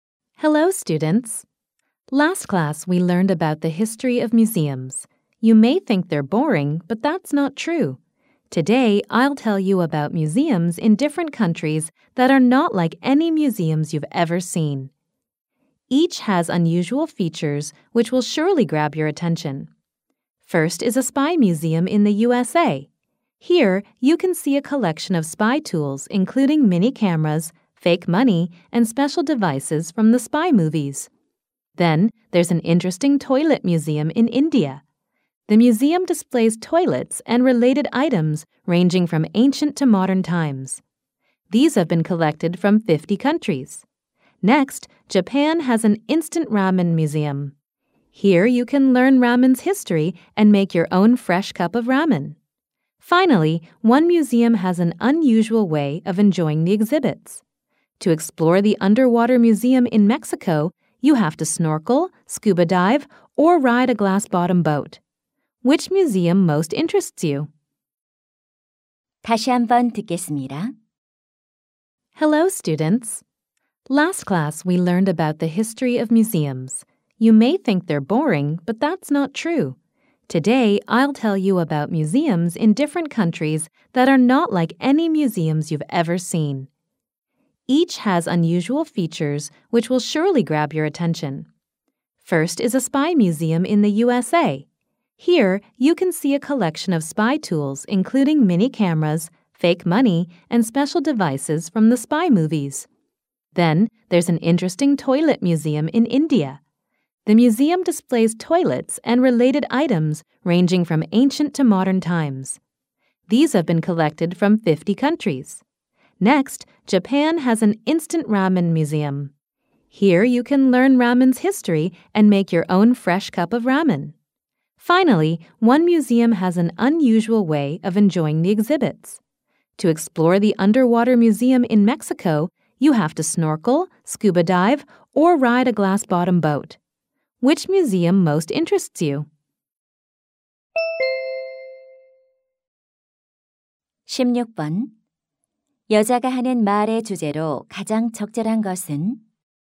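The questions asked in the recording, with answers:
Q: 여자가 하는 말의 주제로 가장 적절한 것은?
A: 여러 나라의 독특한 박물관들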